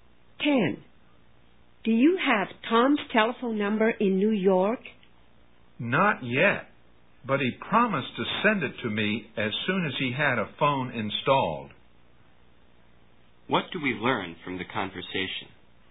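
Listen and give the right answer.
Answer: Tom hasn't had a phone installed in New York yet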